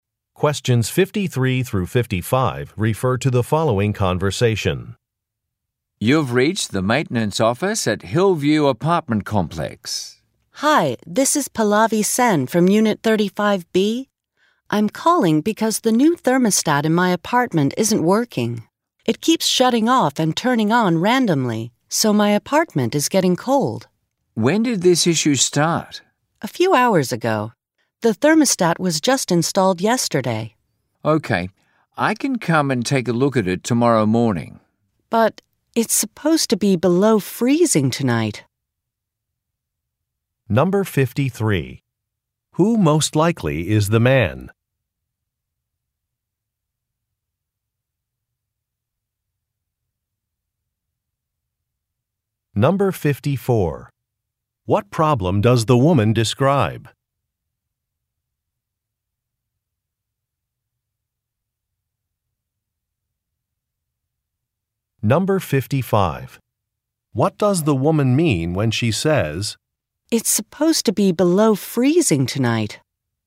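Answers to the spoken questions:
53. A maintenance worker at the apartment complex
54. Her new thermostat isn't working; it keeps turning off and on
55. The repair is urgent; she wants it fixed before tomorrow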